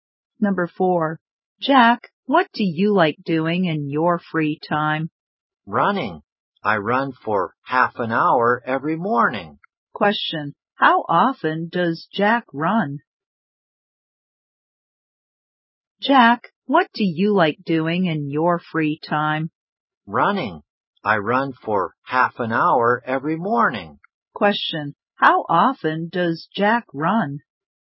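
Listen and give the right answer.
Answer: Every morning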